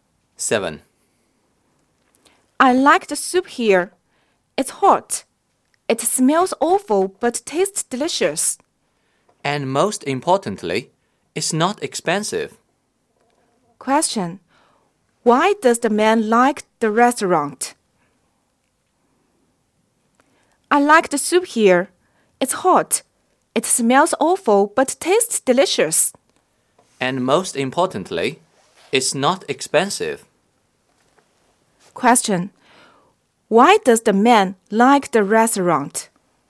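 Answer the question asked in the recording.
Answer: The soup is hot, tastes delicious and is not expensive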